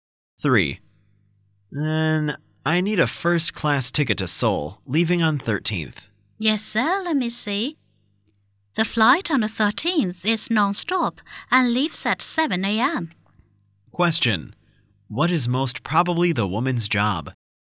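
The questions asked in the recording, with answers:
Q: What is most probably the woman's job?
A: Booking/ticket agent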